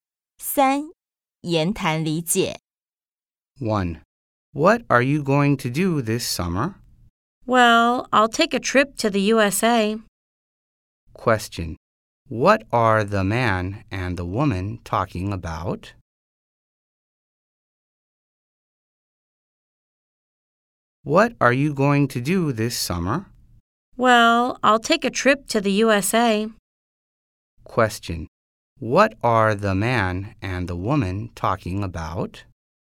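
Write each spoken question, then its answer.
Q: What are the man and the woman talking about?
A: Summer plans (a trip to the USA)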